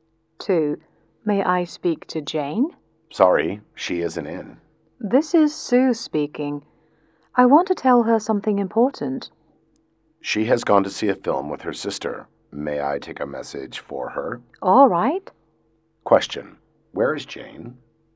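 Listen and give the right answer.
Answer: At the cinema, seeing a film with her sister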